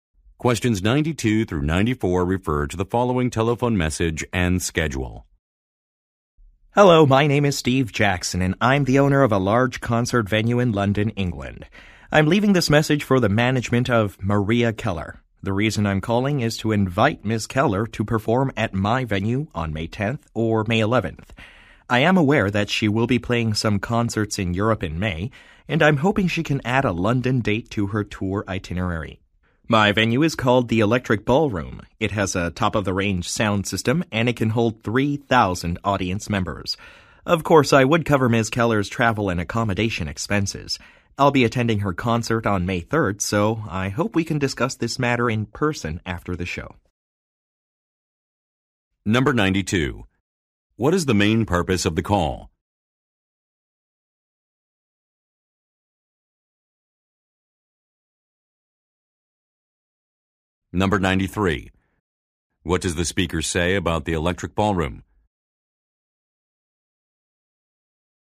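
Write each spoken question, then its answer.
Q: What is the main purpose of the call?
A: To invite Maria Keller to perform at his venue

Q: What does the speaker say about the Electric Ballroom?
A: It has a top sound system and holds 3,000 people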